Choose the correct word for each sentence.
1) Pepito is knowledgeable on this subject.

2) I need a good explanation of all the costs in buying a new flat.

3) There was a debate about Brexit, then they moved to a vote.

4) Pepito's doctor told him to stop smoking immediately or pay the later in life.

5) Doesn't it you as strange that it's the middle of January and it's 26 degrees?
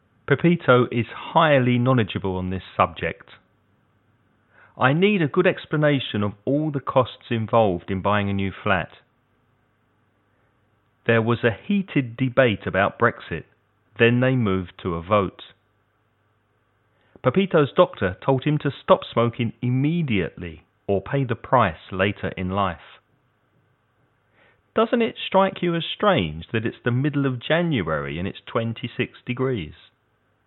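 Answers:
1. highly
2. involved
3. heated
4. price
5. strike

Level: Avanzado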